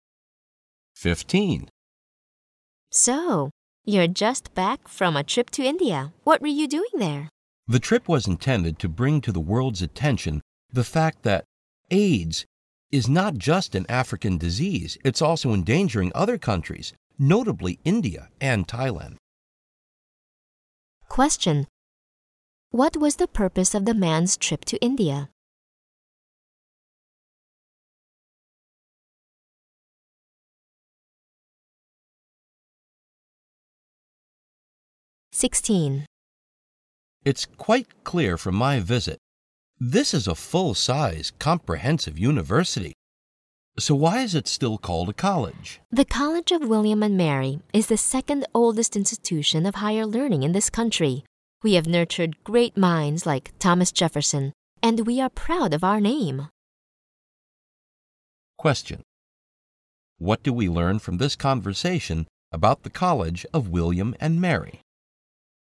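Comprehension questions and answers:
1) What was the purpose of the man's trip to India?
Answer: To draw attention to the spread of AIDS in Asia.

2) What do we learn from this conversation about the College of William and Mary?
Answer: It has a very long history.

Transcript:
W: So, you're just back from a trip to India. What were you doing there?
M: The trip was intended to bring to the world's attention the fact that AIDS is not just an African disease; it's also endangering other countries, notably, India and Thailand.
Q: What was the purpose of the man's trip to India?
M: It's quite clear from my visit this is a full-size comprehensive university. So why is it still called a college?
W: The College of William and Mary is the second oldest institution of higher learning in this country. We have nurtured great minds like Thomas Jefferson and we're proud of our name.
Q: What do we learn from this conversation about the College of William and Mary?

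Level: 六级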